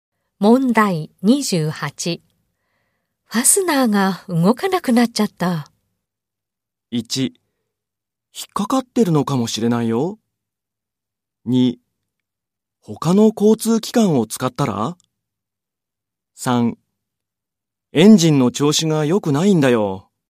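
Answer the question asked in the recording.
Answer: 1: 引っかかってるのかもしれないよ。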